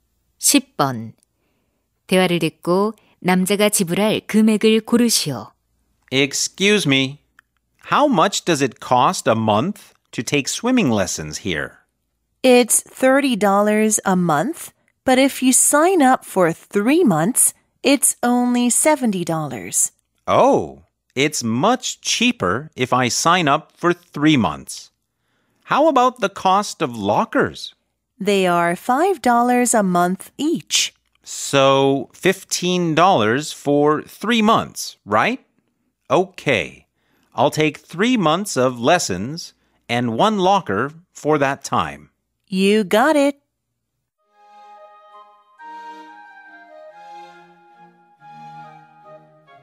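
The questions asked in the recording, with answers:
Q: 대화를 듣고 남자가 지불할 금액을 고르시오.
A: 85달러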